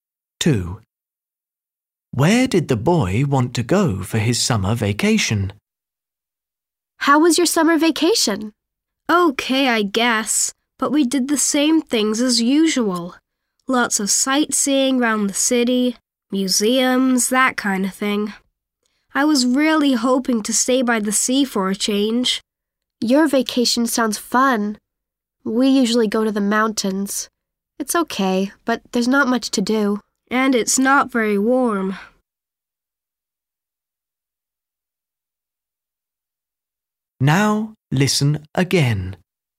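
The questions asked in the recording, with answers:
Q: Where did the boy want to go for his summer vacation?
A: to the sea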